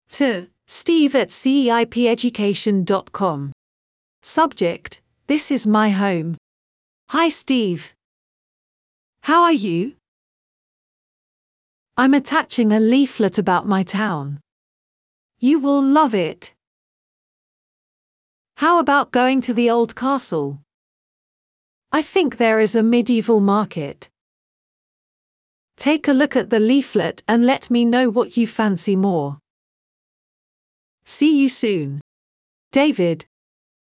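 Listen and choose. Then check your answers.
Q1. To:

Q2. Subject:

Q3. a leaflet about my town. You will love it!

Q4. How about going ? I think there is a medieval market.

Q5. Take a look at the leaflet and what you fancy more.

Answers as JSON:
{"1": "steve@ceipeducation.com", "2": "This is my home.", "3": "I'm attaching", "4": "to the old castle", "5": "let me know"}

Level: 3o Ciclo Inglés Primaria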